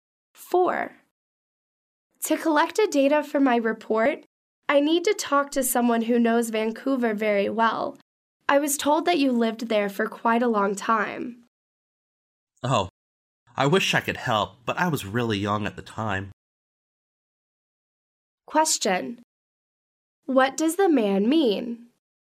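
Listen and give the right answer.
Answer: He can't help because he was very young when he lived in Vancouver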